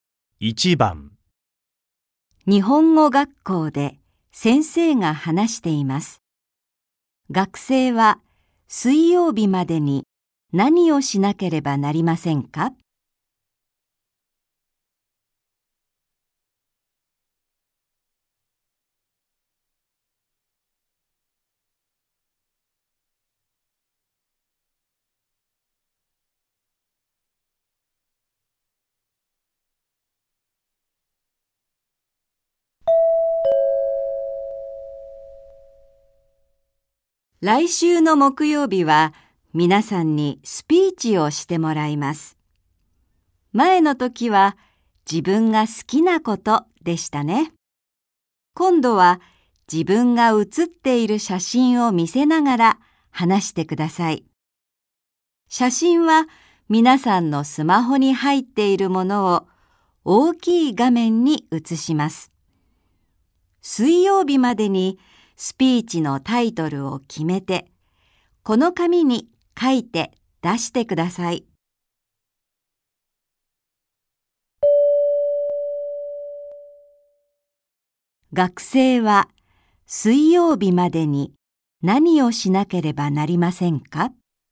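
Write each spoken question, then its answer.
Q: 学生は水曜日までに何をしなければなりませんか?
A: スピーチのタイトルを決めて、紙に書いて出す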